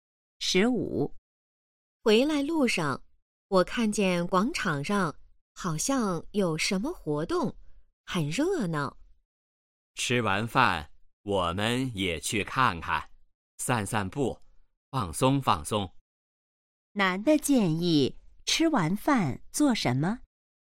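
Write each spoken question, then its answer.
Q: 男的建议吃完饭做什么?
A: 去广场看看,散散步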